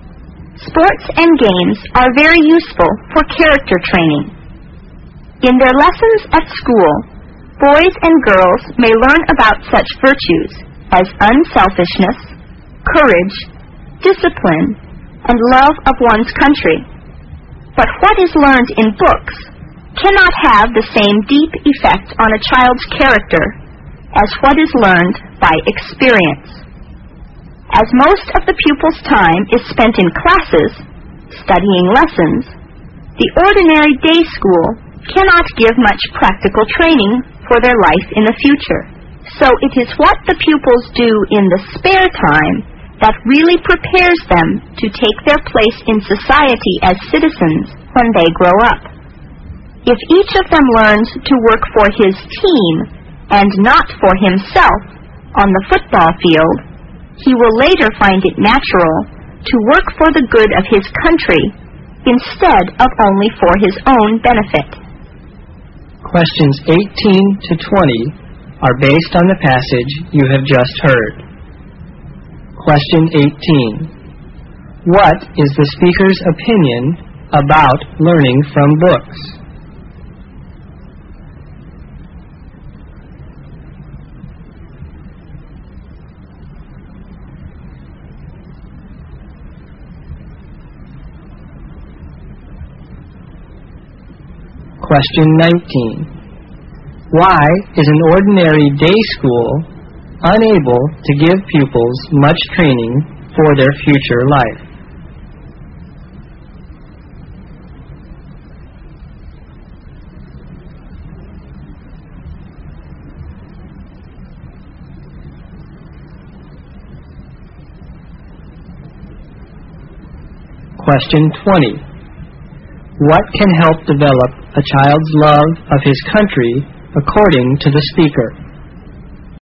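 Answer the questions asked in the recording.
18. It cannot affect a child's character as deeply as learning by experience.
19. Because most of the pupils' time is spent in classes studying lessons.
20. Learning to work for his team, not for himself, on the football field.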